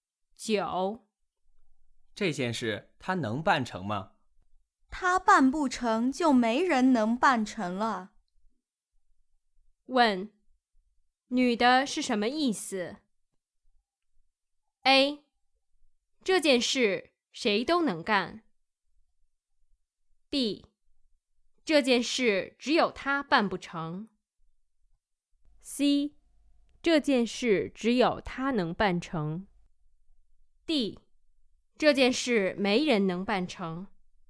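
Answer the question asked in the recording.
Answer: C: 这件事只有他能办成。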